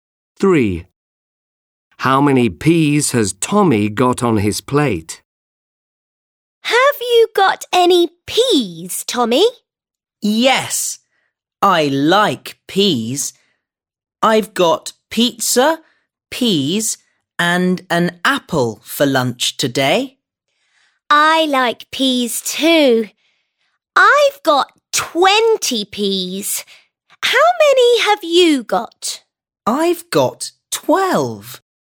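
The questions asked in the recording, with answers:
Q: How many peas has Tommy got on his plate?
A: 12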